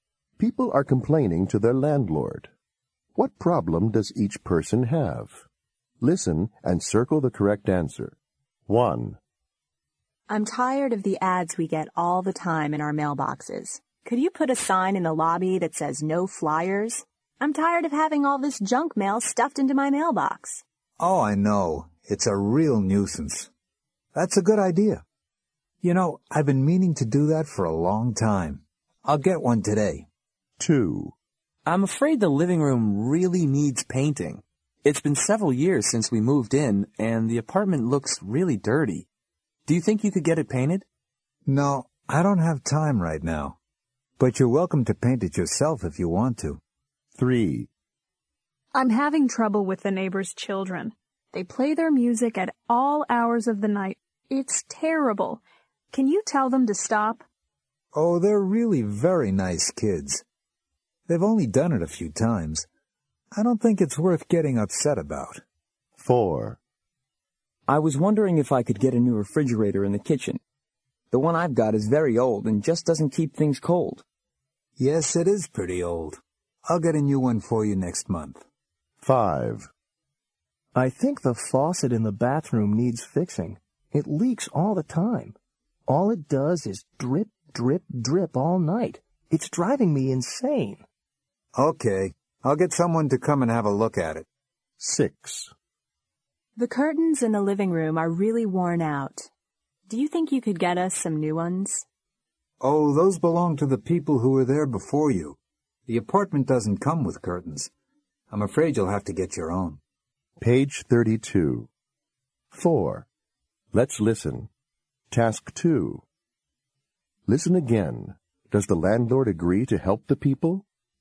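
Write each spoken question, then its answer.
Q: Does the landlord agree to help the people?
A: Yes

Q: Does the landlord agree to help the people?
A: No

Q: Does the landlord agree to help the people?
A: No

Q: Does the landlord agree to help the people?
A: Yes

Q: Does the landlord agree to help the people?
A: Yes

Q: Does the landlord agree to help the people?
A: No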